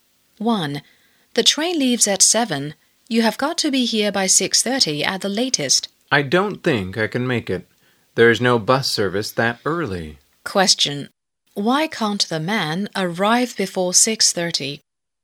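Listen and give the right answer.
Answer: There is no bus service that early.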